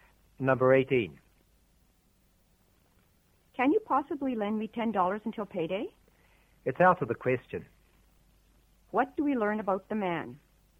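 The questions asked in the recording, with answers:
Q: What do we learn about the man?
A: He refuses to lend the $10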